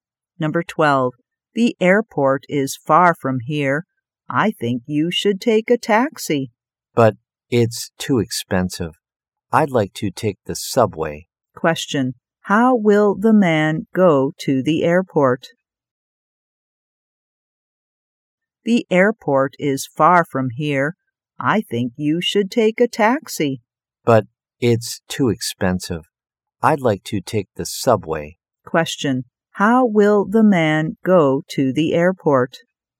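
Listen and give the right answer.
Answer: By subway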